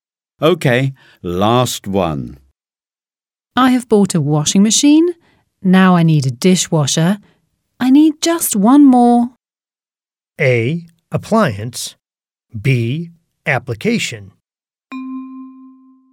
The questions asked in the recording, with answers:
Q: Now I need a dishwasher. I need just one more.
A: A is correct. Appliance.